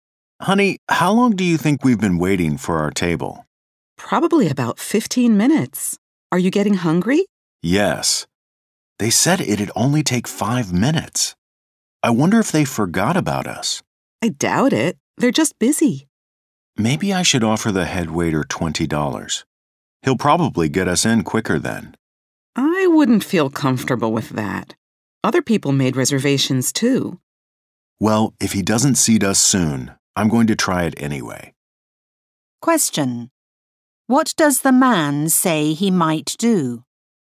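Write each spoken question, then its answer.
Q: What does the man say he might do?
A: Offer the head waiter $20 to get seated quicker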